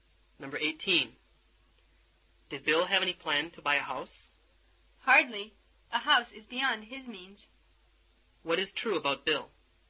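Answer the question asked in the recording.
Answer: He can't afford a house.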